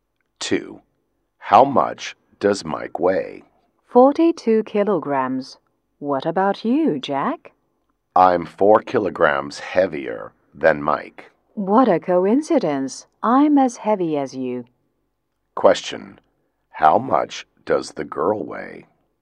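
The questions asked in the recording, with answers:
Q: How much does the girl weigh?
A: 46 kilograms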